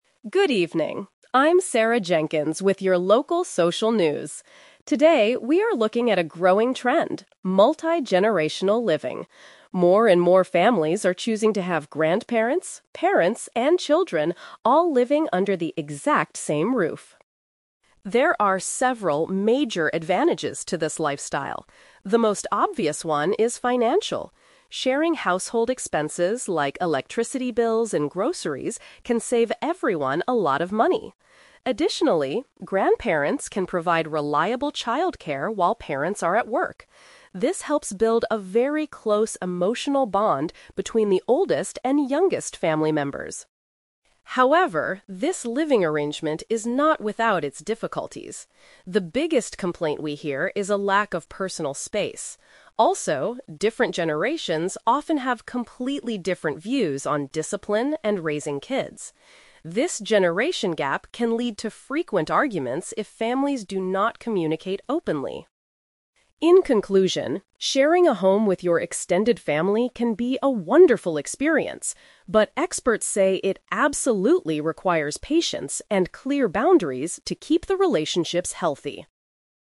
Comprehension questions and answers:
Listen to a news reporter talking about multi-generational families. Choose the best answer (A, B, or C) for each question.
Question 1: What is one of the main advantages of this living situation?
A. The family can reduce their monthly living costs.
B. The parents can quit their jobs to stay at home.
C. The grandparents can learn to use modern technology.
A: The family can reduce their monthly living costs.

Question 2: According to the report, why do families in these homes sometimes argue?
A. They do not have enough money to buy food.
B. They disagree on how to bring up the children.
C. They complain about the noise from the street.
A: They disagree on how to bring up the children.

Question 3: What do professionals say is necessary for this lifestyle to succeed?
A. Taking frequent family vacations together.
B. Buying a much larger house with more bedrooms.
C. Having set rules and an understanding attitude.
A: Having set rules and an understanding attitude.

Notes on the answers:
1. The reporter states that sharing household expenses like electricity and groceries can "save everyone a lot of money." Paraphrasing: save money / sharing expenses = reduce living costs.
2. The report mentions that different generations have different views on "discipline and raising kids," which leads to frequent arguments. Paraphrasing: raising kids = bring up the children; different views = disagree.
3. In the conclusion, experts say it requires "patience and clear boundaries." Paraphrasing: patience = an understanding attitude; clear boundaries = set rules.

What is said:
Reporter: Good evening, I'm Sarah Jenkins with your local social news. Today, we are looking at a growing trend: multi-generational living. More and more families are choosing to have grandparents, parents, and children all living under the exact same roof.
There are several major advantages to this lifestyle. The most obvious one is financial. Sharing household expenses like electricity bills and groceries can save everyone a lot of money. Additionally, grandparents can provide reliable childcare while parents are at work. This helps build a very close emotional bond between the oldest and youngest family members.
However, this living arrangement is not without its difficulties. The biggest complaint we hear is a lack of personal space. Also, different generations often have completely different views on discipline and raising kids. This generation gap can lead to frequent arguments if families do not communicate openly.
In conclusion, sharing a home with your extended family can be a wonderful experience, but experts say it absolutely requires patience and clear boundaries to keep the relationships healthy.

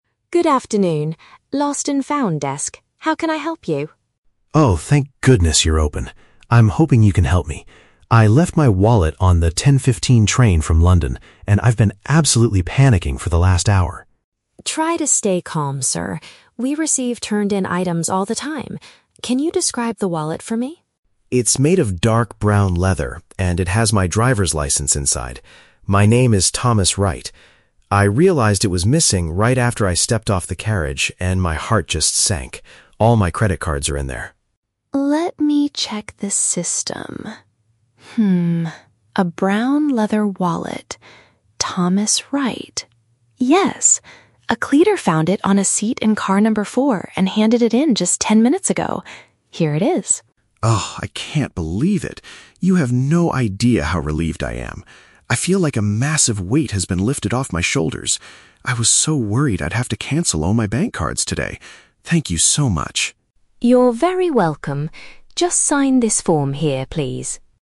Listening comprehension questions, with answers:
Listen to the conversation between a passenger and a station staff member. Choose the correct answer (A, B, or C) for each question.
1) What was Tom's emotional state before he spoke to the staff member?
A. He was incredibly frightened and anxious about his situation.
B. He was furious because a thief had stolen his credit cards.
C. He felt relaxed because he had already canceled his bank cards.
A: He was incredibly frightened and anxious about his situation.

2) How was Tom's lost item returned to the station's desk?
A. Another passenger traveling from London handed it in.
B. A railway worker discovered it on the train and brought it over.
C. A security guard found it lying on the station platform.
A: A railway worker discovered it on the train and brought it over.

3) Why does Tom say he feels "a massive weight has been lifted off my shoulders"?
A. Because he no longer has to carry his heavy luggage around.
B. Because he is experiencing extreme comfort and relief.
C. Because he doesn't need to pay a fee to get his item back.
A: Because he is experiencing extreme comfort and relief.

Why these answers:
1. The Key: Tom says he has been "absolutely panicking" and that his "heart just sank" when he realized the wallet was missing. "Frightened and anxious" is a good paraphrase for panicking. The Plausible (B): He lost his credit cards, which is why he is upset, but there is no mention of a thief stealing them; he simply "left" the wallet on the train. The Trap (C): He says he was worried he would have to cancel his bank cards, meaning he hasn't done it yet. He is definitely not relaxed.
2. The Key: Maria says a "cleaner found it on a seat... and handed it in." A cleaner working on a train is a railway worker. The Trap (A): The audio mentions the train was "from London," but a cleaner found the wallet, not another passenger. The Plausible (C): People often drop things on the platform, but Maria explicitly states it was found "on a seat in car number 4," which means inside the train.
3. The Key: Tom explicitly says, "You have no idea how relieved I am." The idiom "a massive weight has been lifted off my shoulders" means feeling extreme relief from anxiety. The Trap (A): The idiom uses the word "weight" and "shoulders," which might make students think about heavy physical luggage, but this is a metaphorical expression about stress. The Plausible (C): Sometimes Lost and Found services charge a small fee, but this is never mentioned in the audio.

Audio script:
Maria: Good afternoon. Lost and Found desk. How can I help you?
Tom: Oh, thank goodness you're open. I'm hoping you can help me. I left my wallet on the 10:15 train from London, and I've been absolutely panicking for the last hour.
Maria: Try to stay calm, sir. We receive turned-in items all the time. Can you describe the wallet for me?
Tom: It's made of dark brown leather, and it has my driver's license inside. My name is Thomas Wright. I realized it was missing right after I stepped off the carriage, and my heart just sank. All my credit cards are in there.
Maria: Let me check the system. a brown leather wallet... Thomas Wright. Yes! A cleaner found it on a seat in car number 4 and handed it in just ten minutes ago. Here it is.
Tom: Oh, I can't believe it! You have no idea how relieved I am. I feel like a massive weight has been lifted off my shoulders. I was so worried I'd have to cancel all my bank cards today. Thank you so much!

